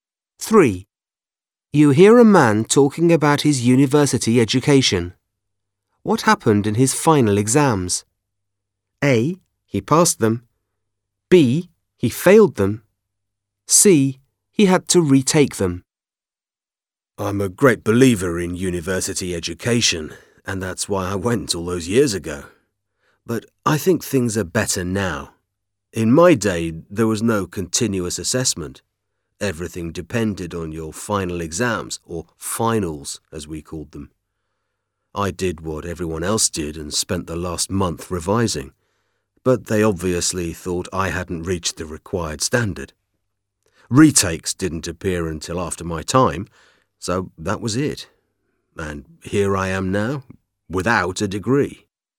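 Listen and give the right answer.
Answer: B: He failed them.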